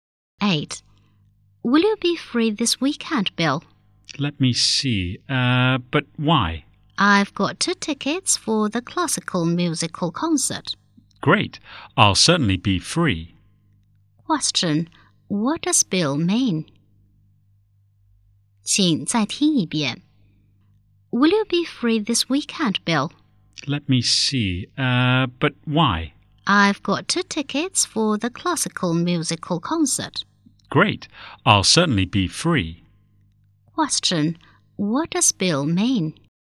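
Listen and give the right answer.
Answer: He will be free to go to the concert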